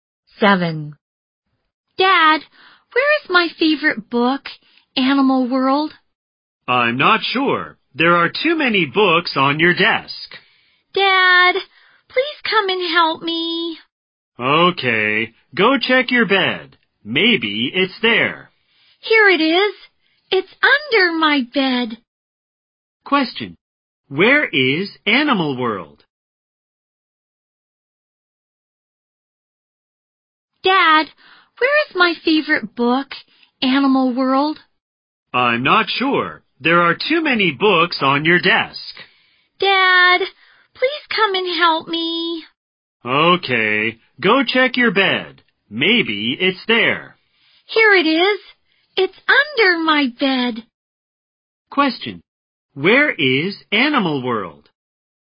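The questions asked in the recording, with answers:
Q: Question. Where is Animal World?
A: Under the bed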